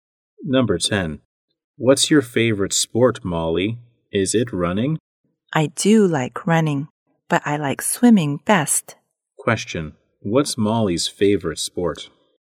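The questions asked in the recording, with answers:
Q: What's Molly's favorite sport?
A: Swimming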